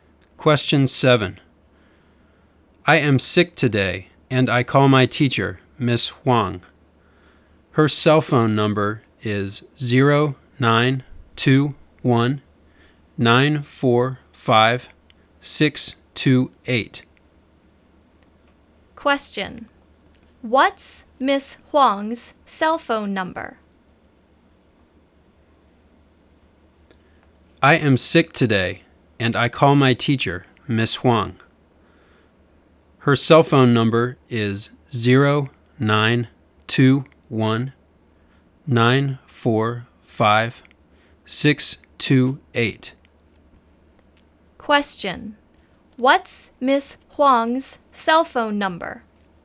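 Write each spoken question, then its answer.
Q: What's Miss Huang's cell phone number?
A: 0921-945-628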